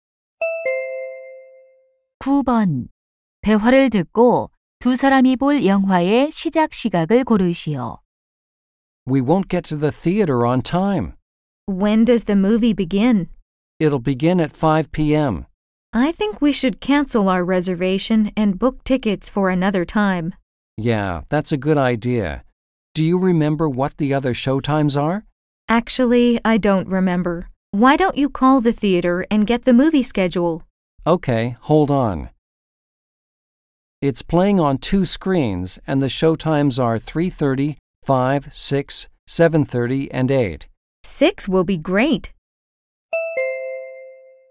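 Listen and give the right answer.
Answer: 오후 6시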